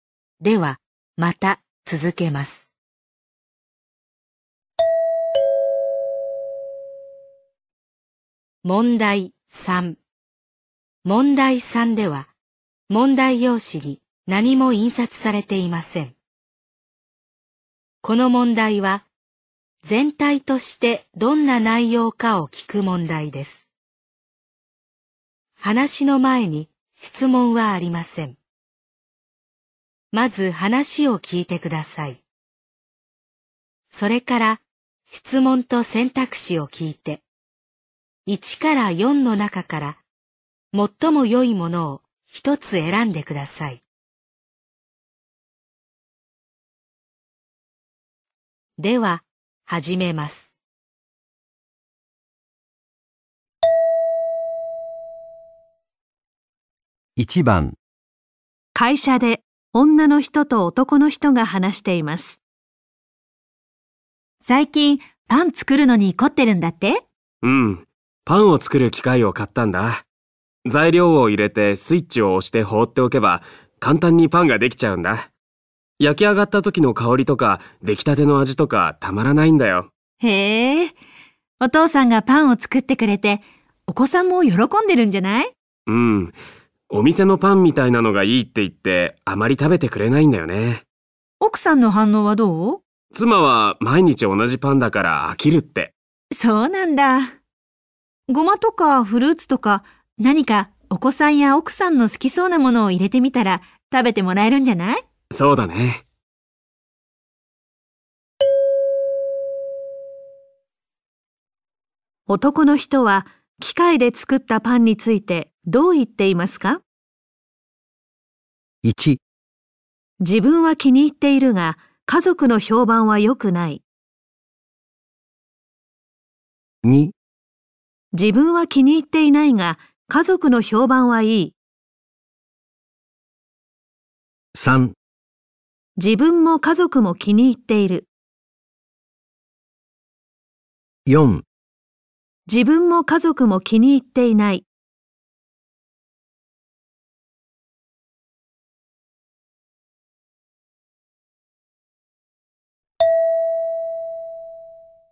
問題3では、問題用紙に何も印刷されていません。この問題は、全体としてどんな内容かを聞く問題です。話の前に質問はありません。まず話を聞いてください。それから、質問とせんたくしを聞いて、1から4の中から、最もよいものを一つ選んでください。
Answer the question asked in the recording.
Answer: 1

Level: N2 Listening · Test 3